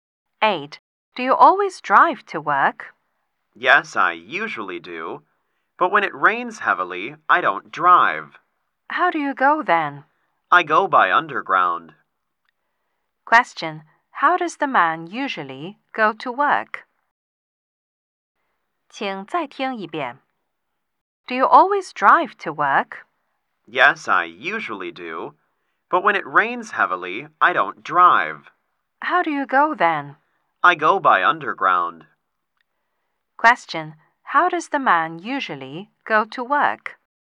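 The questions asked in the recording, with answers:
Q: How does the man usually go to work?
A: He drives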